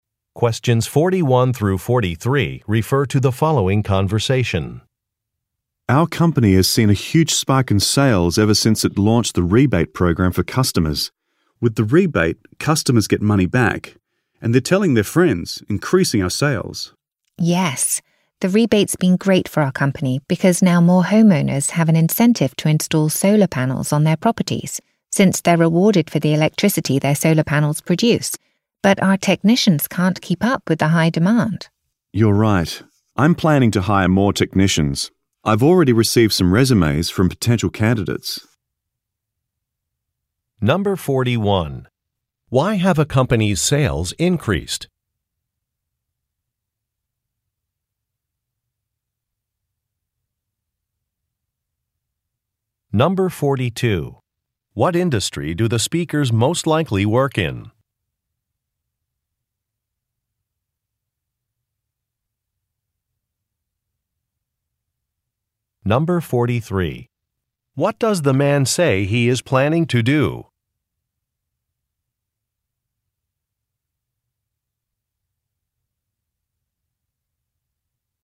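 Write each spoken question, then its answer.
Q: Why have a company's sales increased?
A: Because of a rebate program for customers

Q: What industry do the speakers most likely work in?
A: Solar energy

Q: What does the man say he is planning to do?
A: Hire more technicians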